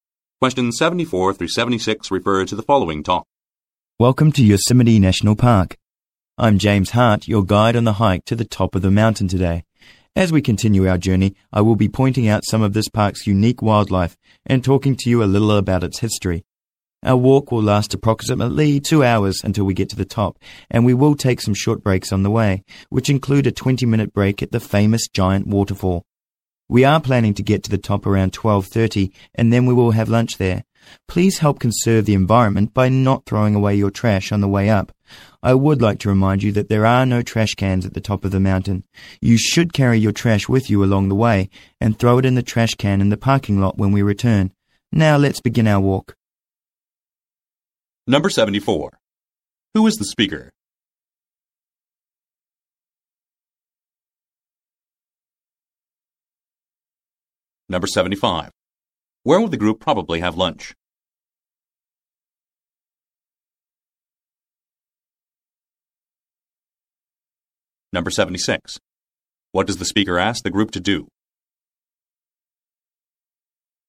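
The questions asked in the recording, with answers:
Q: Who is the speaker?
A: A tour guide on a hike

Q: Where will the group probably have lunch?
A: At the top of the mountain

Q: What does the speaker ask the group to do?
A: Carry their trash with them and not throw it away on the way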